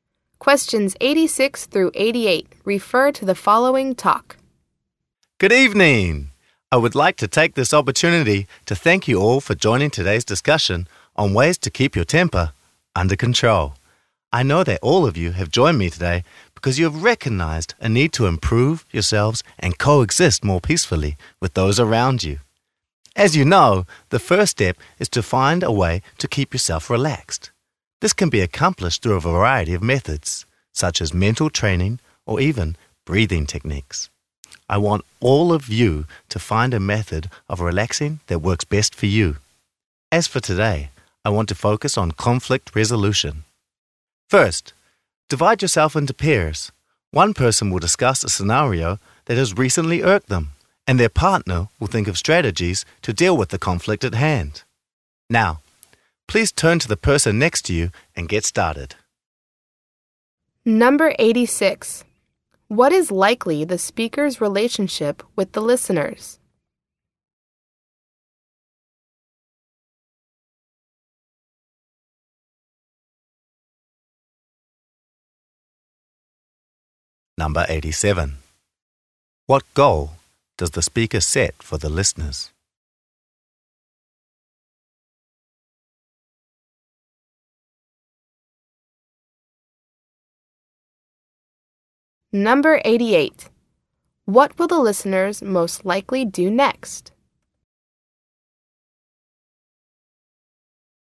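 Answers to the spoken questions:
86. Instructor and participants of an anger-management session
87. Find a relaxation method that works best for them
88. Work in pairs on conflict resolution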